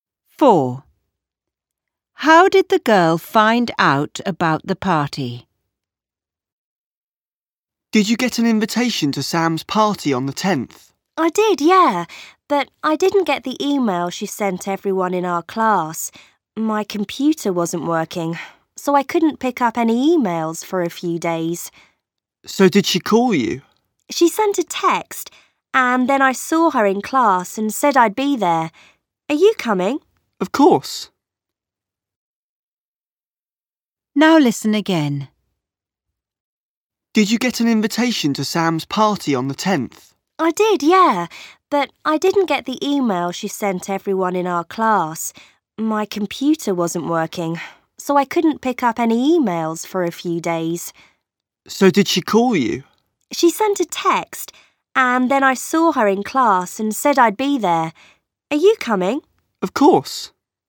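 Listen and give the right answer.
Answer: By text message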